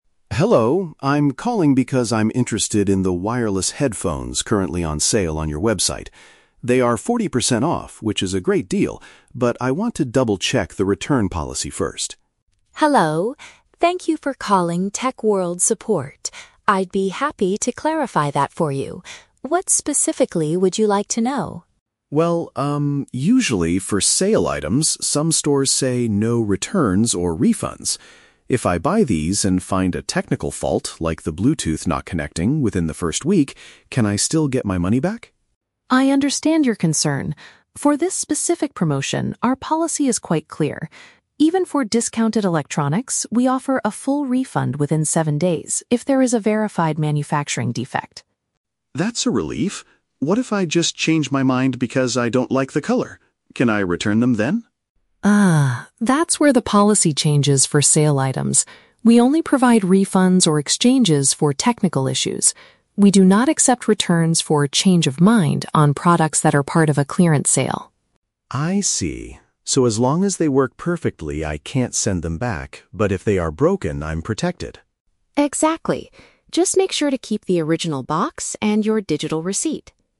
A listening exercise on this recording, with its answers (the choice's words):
Listen to a conversation between a customer and a store agent. Choose the best answer (A, B, or C) for each question.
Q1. What is the customer's main reason for calling the support center?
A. To ask for an additional 40% discount on a pair of headphones.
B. To confirm if he can get a refund for a faulty product on sale.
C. To complain about a Bluetooth connection problem he is having.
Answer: To confirm if he can get a refund for a faulty product on sale.

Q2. Under what condition can the customer return the "sale item" for a refund?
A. If the customer decides the color does not match his style.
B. If the customer finds a cheaper price at another electronics store.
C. If the product has a functional error caused by the manufacturer.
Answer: If the product has a functional error caused by the manufacturer.

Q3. What must the customer keep in order to use the return policy?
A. The physical store location's address and the agent's name.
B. The item's initial packaging and the proof of purchase.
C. A printed photograph of the headphones when they arrived.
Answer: The item's initial packaging and the proof of purchase.

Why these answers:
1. The customer asks if he can "get my money back" if there is a "technical fault" within the first week. Option B paraphrases "money back" as "refund" and "technical fault" as "faulty product."
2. The agent states they offer a refund if there is a "verified manufacturing defect." Option C uses synonyms: "functional error" (defect) and "manufacturer."
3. The agent tells the customer to "keep the original box and your digital receipt." Option B paraphrases this as "initial packaging" (original box) and "proof of purchase" (receipt).

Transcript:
Customer: Hello, I'm calling because I'm interested in the wireless headphones currently on sale on your website. They are 40% off, which is a great deal, but I want to double-check the return policy first.
Agent: Hello! Thank you for calling TechWorld Support. I'd be happy to clarify that for you. What specifically would you like to know?
Customer: Well, um, usually for "sale items," some stores say "no returns or refunds." If I buy these and find a technical fault—like the Bluetooth not connecting—within the first week, can I still get my money back?
Agent: I understand your concern. For this specific promotion, our policy is quite clear. Even for discounted electronics, we offer a full refund within 7 days if there is a verified manufacturing defect.
Customer: That's a relief. What if I just change my mind because I don't like the color? Can I return them then?
Agent: Ah, that's where the policy changes for sale items. We only provide refunds or exchanges for technical issues. We do not accept returns for "change of mind" on products that are part of a clearance sale.
Customer: I see. So as long as they work perfectly, I can't send them back. But if they are broken, I'm protected.